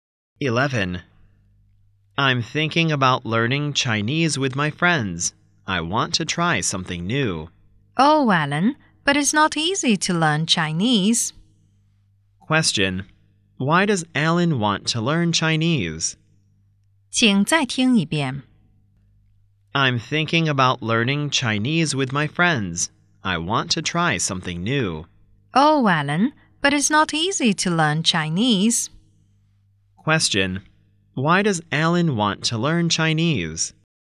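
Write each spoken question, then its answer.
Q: Why does Alan want to learn Chinese?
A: He wants to try something new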